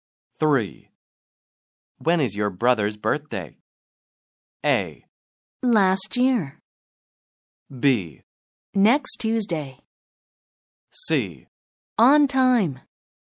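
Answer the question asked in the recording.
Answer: B: Next Tuesday.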